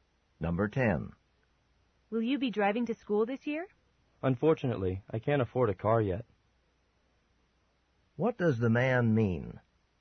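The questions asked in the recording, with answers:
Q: What does the man mean?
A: He won't drive because he can't afford a car.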